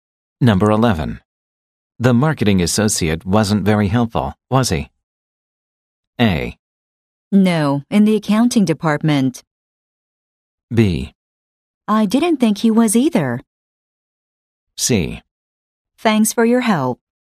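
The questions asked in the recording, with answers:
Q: The marketing associate wasn't very helpful, was he?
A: B: I didn't think he was either.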